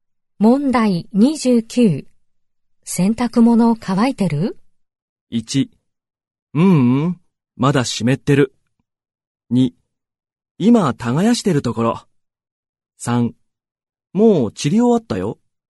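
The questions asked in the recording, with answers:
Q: 洗濯物乾いてる?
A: 1: うん、まだ湿ってる。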